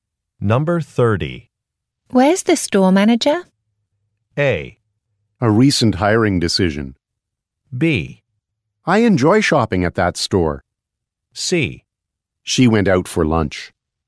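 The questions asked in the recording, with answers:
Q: Where's the store manager?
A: C: She went out for lunch.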